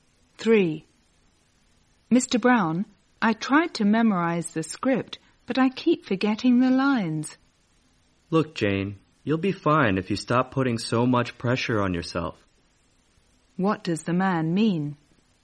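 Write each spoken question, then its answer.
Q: What does the man mean?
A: Jane should relax and stop putting so much pressure on herself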